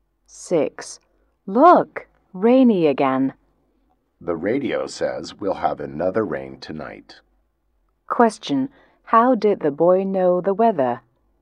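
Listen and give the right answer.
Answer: From the radio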